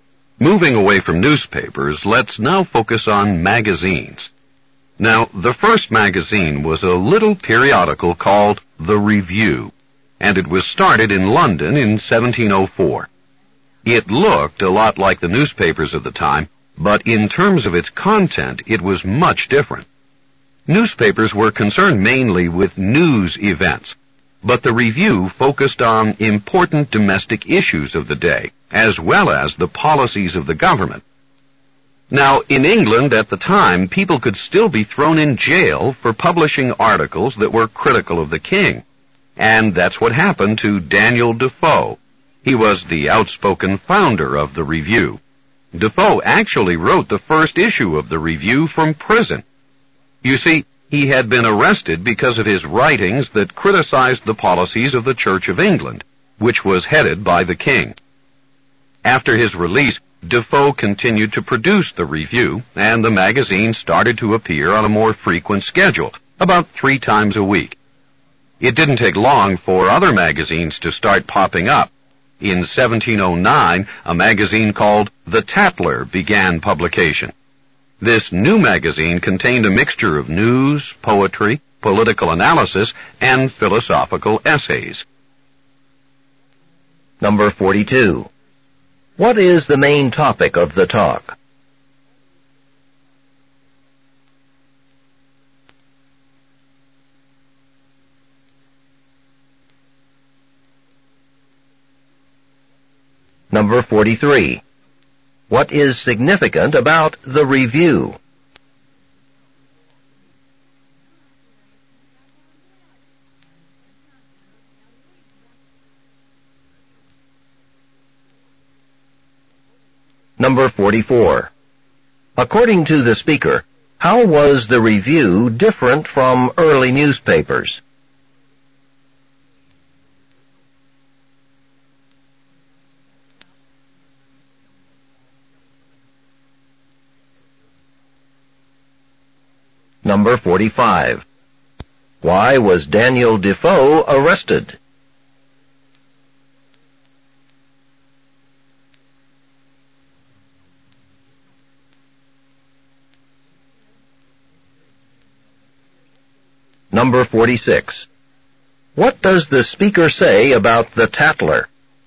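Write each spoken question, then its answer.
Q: What is the main topic of the talk?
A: The first magazines and how they began

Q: What is significant about the Review?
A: It was the first magazine

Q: According to the speaker, how was the Review different from early newspapers?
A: It focused on important domestic issues and government policies rather than news events

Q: Why was Daniel Defoe arrested?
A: His writings criticized the policies of the Church of England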